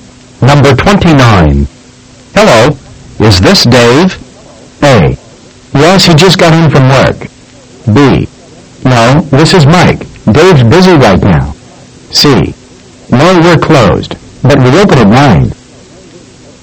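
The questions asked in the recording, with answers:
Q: Hello, is this Dave?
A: B: No, this is Mike. Dave's busy right now.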